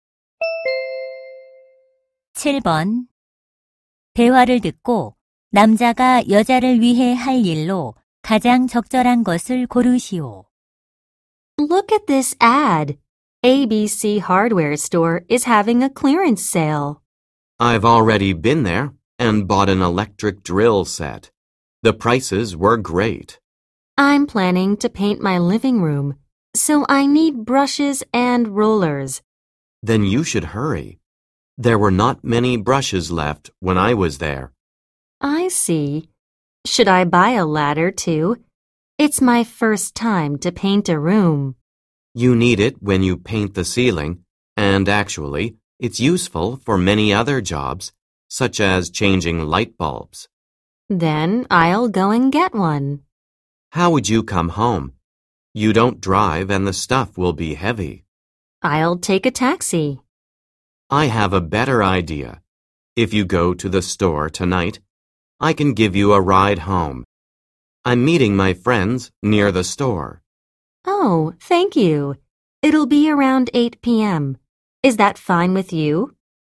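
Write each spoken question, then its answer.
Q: 대화를 듣고 남자가 여자를 위해 할 일로 가장 적절한 것을 고르시오.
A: 여자를 집까지 차로 태워다 주기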